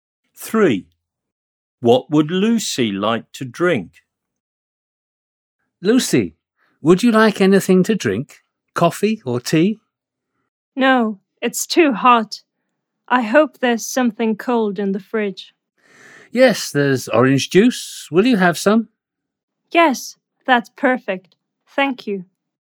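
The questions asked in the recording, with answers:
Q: What would Lucy like to drink?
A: Orange juice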